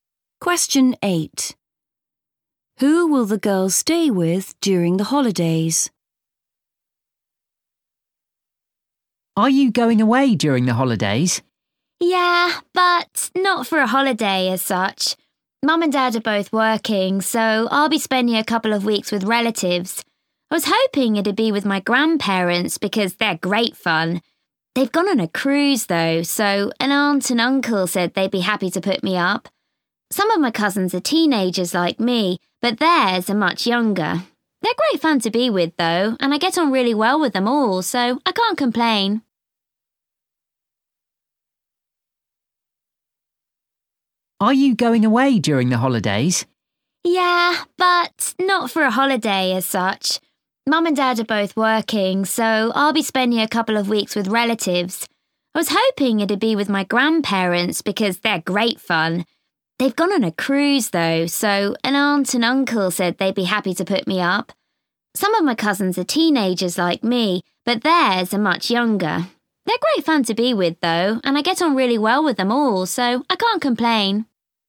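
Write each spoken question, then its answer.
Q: Who will the girls stay with during the holidays?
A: her aunt and uncle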